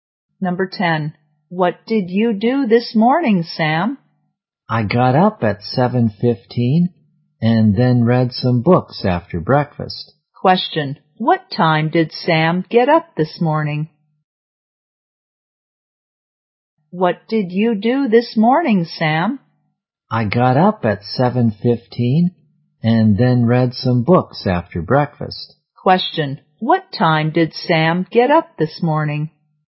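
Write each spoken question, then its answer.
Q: What time did Sam get up this morning?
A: At 7:15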